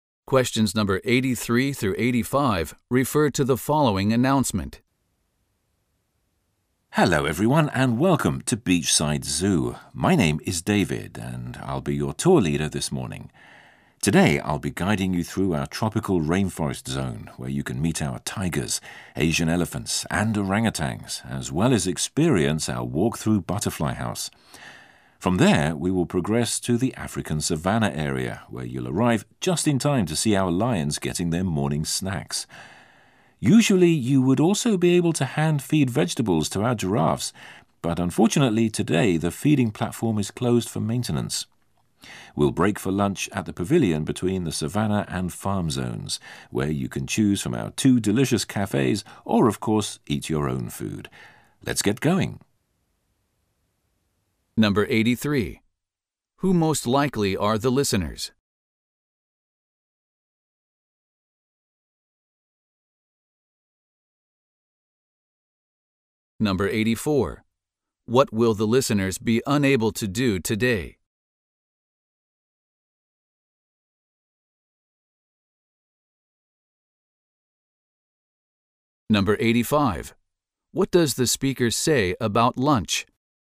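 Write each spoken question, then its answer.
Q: Who most likely are the listeners?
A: Visitors on a zoo tour

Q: What will the listeners be unable to do today?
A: Hand-feed the giraffes

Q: What does the speaker say about lunch?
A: Listeners can buy food at one of two cafes or eat their own food at the pavilion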